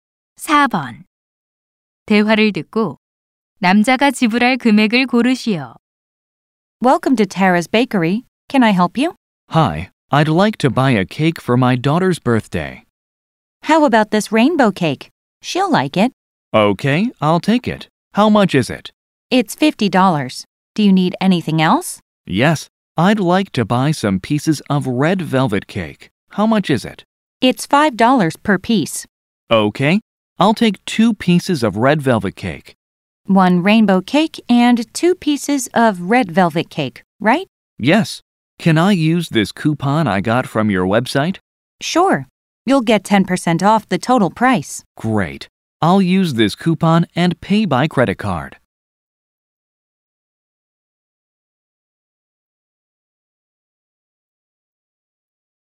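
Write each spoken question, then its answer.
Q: 대화를 듣고 남자가 지불할 금액을 고르시오.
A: $54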